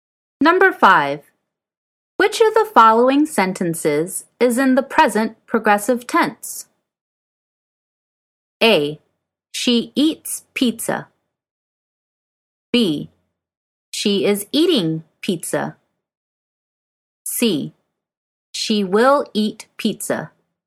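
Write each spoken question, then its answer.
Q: Which of the following sentences is in the present progressive tense?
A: B: She is eating pizza.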